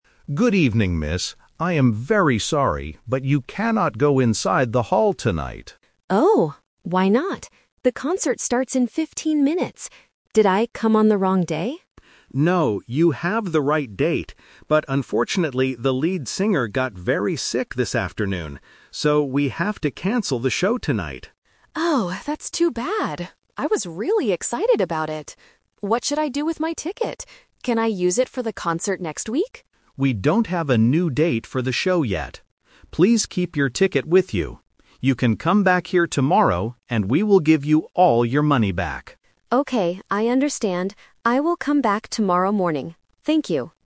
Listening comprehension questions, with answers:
Listen to the conversation between a theater staff member and a woman. Choose the correct answer (A, B, or C) for each question.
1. Why can't the woman go inside?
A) Because she arrived on the wrong day.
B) Because she is 15 minutes late.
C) Because the concert is canceled.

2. What is the reason for the problem tonight?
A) The lead singer is sick.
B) The theater is closed for cleaning.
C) The band cannot find the theater.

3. What does the staff member tell the woman to do?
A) Use the ticket for a show next week.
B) Keep her ticket and return tomorrow for a refund.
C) Call the theater tomorrow morning.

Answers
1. C) Because the concert is canceled.
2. A) The lead singer is sick.
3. B) Keep her ticket and return tomorrow for a refund.

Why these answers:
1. The staff member says, "...we have to cancel the show tonight." Option (A) is the A2 Twist/Trap; the woman asks if she came on the wrong day, but the man says "No, you have the right date." Option (B) is a math/time trap because the concert "starts in 15 minutes", she is not late.
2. The man explicitly states the reason: "...the lead singer got very sick this afternoon." Options (B) and (C) are plausible reasons for a cancellation in real life, but they are completely unmentioned in the audio.
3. The staff member instructs her clearly: "Please keep your ticket with you. You can come back here tomorrow, and we will give you all your money back." Option (A) is a trap because the woman asks if she can use it next week, but the man says they don't have a new date yet. Option (C) is a trap using the word "tomorrow," but she has to "come back," not call.

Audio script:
Man: Good evening, miss. I am very sorry, but you cannot go inside the hall tonight.
Woman: Oh? Why not? The concert starts in 15 minutes! Did I come on the wrong day?
Man: No, you have the right date. But unfortunately, the lead singer got very sick this afternoon. So, we have to cancel the show tonight.
Woman: Oh, that's too bad! I was really excited about it. What should I do with my ticket? Can I use it for the concert next week?
Man: We don't have a new date for the show yet. Please keep your ticket with you. You can come back here tomorrow, and we will give you all your money back.

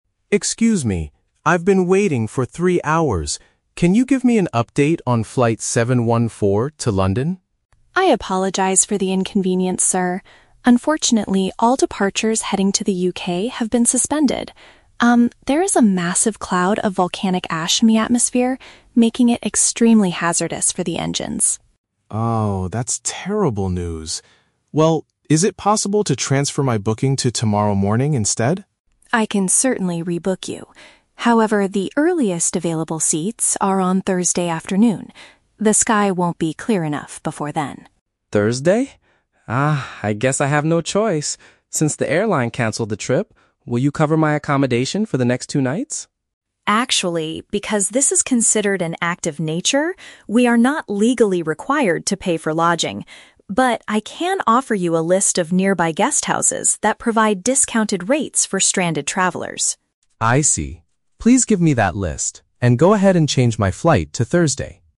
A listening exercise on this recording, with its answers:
Listen to a conversation between a passenger and an airline agent, and choose the correct answer (A, B, or C) for each question.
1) Why are the planes currently unable to leave the airport?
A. The aircraft engines are currently being repaired by mechanics.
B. Dangerous materials from a mountain eruption are in the air.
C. The airline pilots have decided to go on a sudden strike.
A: B. Dangerous materials from a mountain eruption are in the air.

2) When will the passenger finally be able to travel?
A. The very next morning.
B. Sometime over the weekend.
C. Later in the week, after lunch.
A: C. Later in the week, after lunch.

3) What will the airline provide for the passenger tonight?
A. Information about cheaper places to sleep in the area.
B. A free stay at a comfortable five-star hotel.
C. A complimentary hot meal at the airport restaurant.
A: A. Information about cheaper places to sleep in the area.

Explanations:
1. The agent states there is a "massive cloud of volcanic ash in the atmosphere" which is hazardous. "Dangerous materials from a mountain eruption" is a paraphrase for volcanic ash, and "in the air" means in the atmosphere.
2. The agent says the earliest seats are on "Thursday afternoon". "Later in the week" and "after lunch" are paraphrases for Thursday afternoon.
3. The agent offers "a list of nearby guesthouses that provide discounted rates". "Cheaper places to sleep" is a paraphrase of guesthouses with discounted rates.

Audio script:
David: Excuse me. I've been waiting for three hours. Can you give me an update on flight 714 to London?
Sarah: I apologize for the inconvenience, sir. Unfortunately, all departures heading to the UK have been suspended. Um, there is a massive cloud of volcanic ash in the atmosphere, making it extremely hazardous for the engines.
David: Oh, that's terrible news. Well, is it possible to transfer my booking to tomorrow morning instead?
Sarah: I can certainly rebook you. However, the earliest available seats are on Thursday afternoon. The sky won't be clear enough before then.
David: Thursday? Ah, I guess I have no choice. Since the airline canceled the trip, will you cover my accommodation for the next two nights?
Sarah: Actually, because this is considered an act of nature, we are not legally required to pay for lodging. But, I can offer you a list of nearby guesthouses that provide discounted rates for stranded travelers.

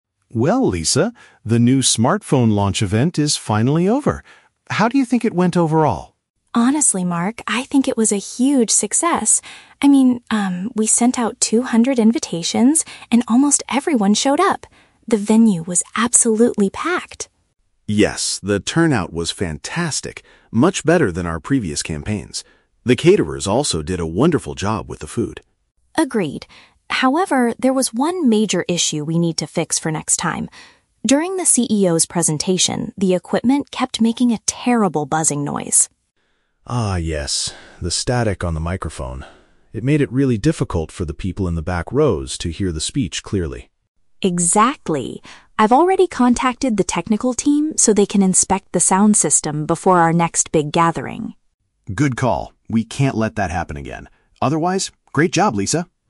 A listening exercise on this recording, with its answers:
Listen to a conversation between a marketing manager and his staff member evaluating a recent event. Choose the correct answer (A, B, or C) for each question.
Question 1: What aspect of the event do they consider highly successful?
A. The high volume of guests who attended the launch.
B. The delicious meals cooked by the marketing team.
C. The positive reviews about the new smartphone's design.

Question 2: What problem occurred during the event?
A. There were not enough chairs for the large audience.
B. The company's leader arrived late for his speech.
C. There was an annoying issue with the audio devices.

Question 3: What action has Lisa taken to prevent the problem in the future?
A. She asked the IT experts to examine the electronic equipment.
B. She purchased a brand new microphone for the presenters.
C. She decided to rent a different location for the next gathering.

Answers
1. A. The high volume of guests who attended the launch.
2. C. There was an annoying issue with the audio devices.
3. A. She asked the IT experts to examine the electronic equipment.

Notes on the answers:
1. Lisa says "almost everyone showed up" and "the venue was absolutely packed," while Mark adds that the "turnout was fantastic." Option (A) is a perfect paraphrase of this. Option (B) is a trap; the food was wonderful, but it was prepared by the "caterers," not the marketing team. Option (C) is a plausible guess but is never discussed in the audio.
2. The speakers mention the equipment making a "terrible buzzing noise" and the "static on the microphone." Option (C) uses synonyms ("audio devices" = microphone/sound system, "annoying issue" = terrible buzzing noise). Option (A) is a logical guess since the venue was packed, but it is never stated. Option (B) is a trap; the "CEO's presentation" is mentioned, but he was not late.
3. Lisa states that she "contacted the technical team so they can inspect the sound system." Option (A) paraphrases this perfectly ("IT experts" = technical team, "examine" = inspect, "electronic equipment" = sound system). Option (B) is a trap; the "microphone" is mentioned as the source of the problem, but she didn't buy a new one. Option (C) is a trap; a "gathering" is mentioned, but she did not change the location.

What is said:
Mark: Well, Lisa, the new smartphone launch event is finally over. How do you think it went overall?
Lisa: Honestly, Mark, I think it was a huge success. I mean, um, we sent out two hundred invitations, and almost everyone showed up. The venue was absolutely packed!
Mark: Yes, the turnout was fantastic. Much better than our previous campaigns. The caterers also did a wonderful job with the food.
Lisa: Agreed. However, there was one major issue we need to fix for next time. During the CEO's presentation, the equipment kept making a terrible buzzing noise.
Mark: Ah, yes. The static on the microphone. It made it really difficult for the people in the back rows to hear the speech clearly.
Lisa: Exactly. I've already contacted the technical team so they can inspect the sound system before our next big gathering.

